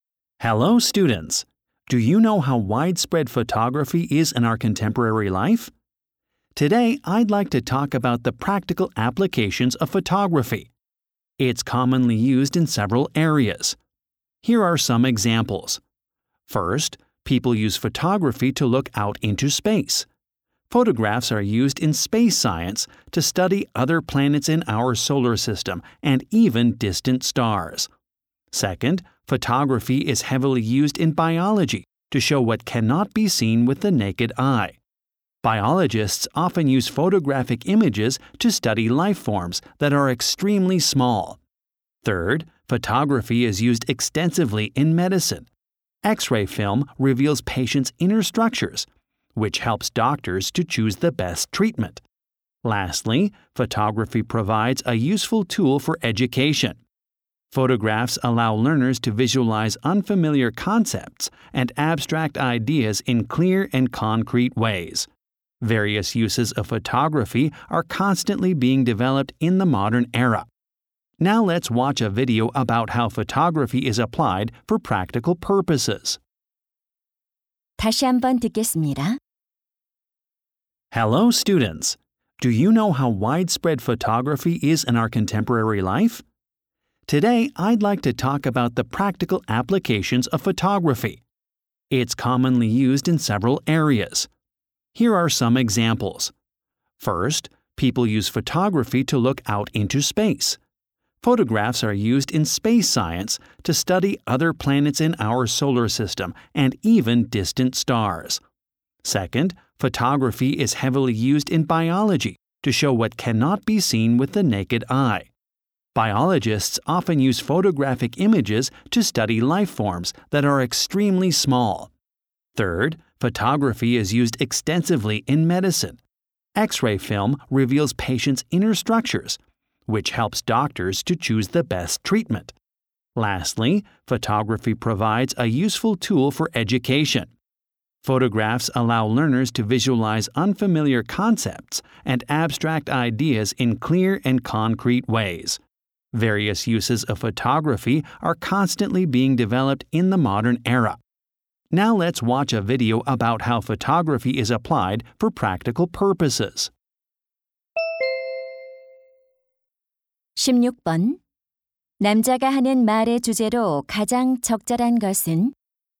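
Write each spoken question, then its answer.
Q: 남자가 하는 말의 주제로 가장 적절한 것은?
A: 사진의 실용적인 활용 분야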